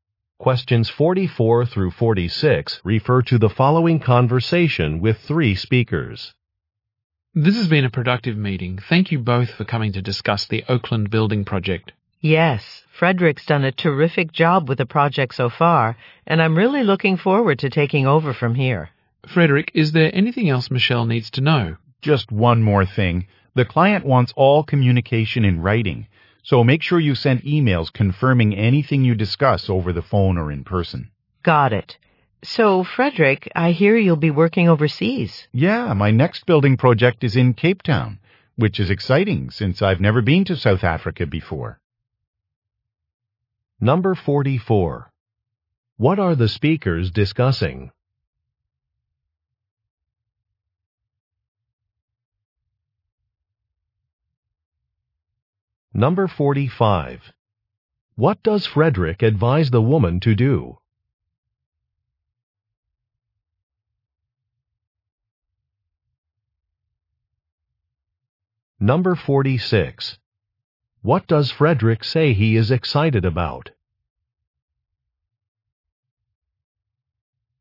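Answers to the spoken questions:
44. Handing over the Oakland Building Project
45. Confirm all discussions with the client in writing by email
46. Going to South Africa for the first time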